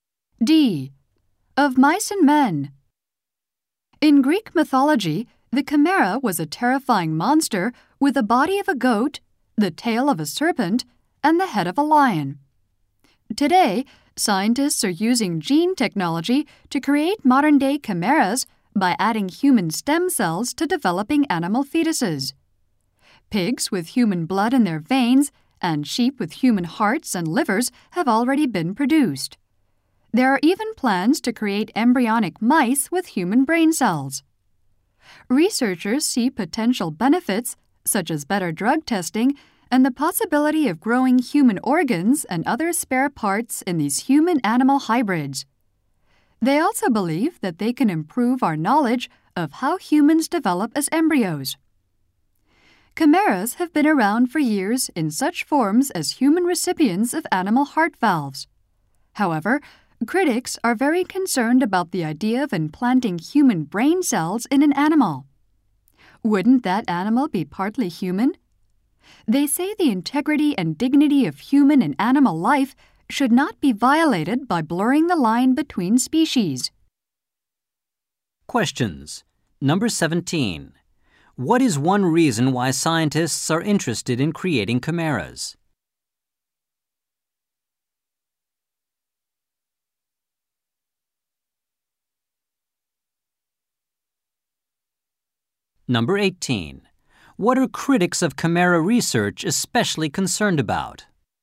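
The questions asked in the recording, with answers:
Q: What is one reason why scientists are interested in creating chimeras?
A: Better drug testing or growing human organs

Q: What are critics of chimera research especially concerned about?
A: Implanting human brain cells in animals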